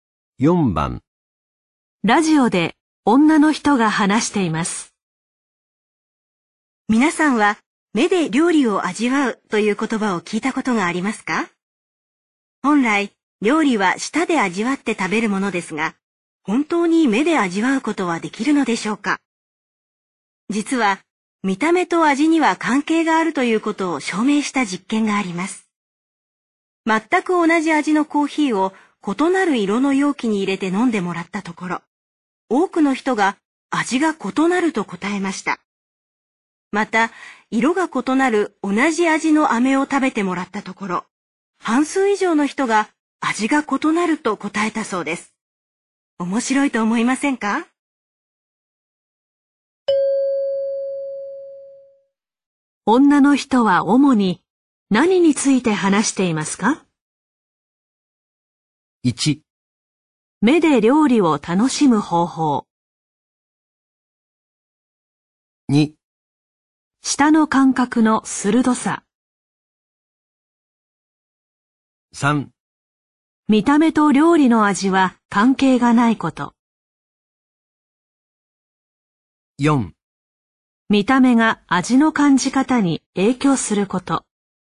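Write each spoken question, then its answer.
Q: 女の人は主に何について話していますか?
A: 4: 見た目が味の感じ方に影響すること。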